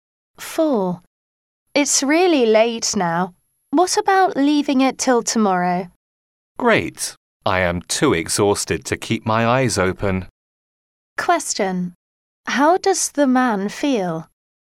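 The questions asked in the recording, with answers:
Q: How does the man feel?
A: Very tired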